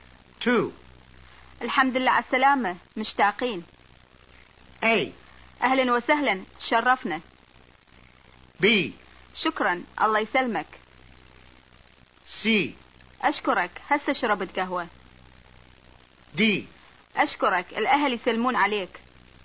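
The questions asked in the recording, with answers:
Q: الحمد لله على السلامة مشتاقين.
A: B: شكرا الله يسلمك.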